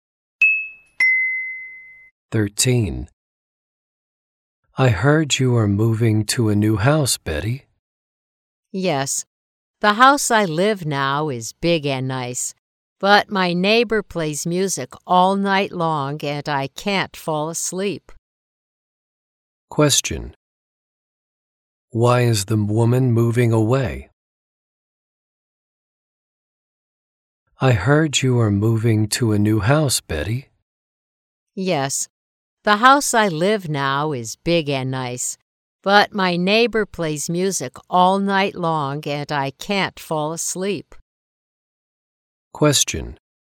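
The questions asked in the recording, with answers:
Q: Why is the woman moving away?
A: Her neighbor plays music all night long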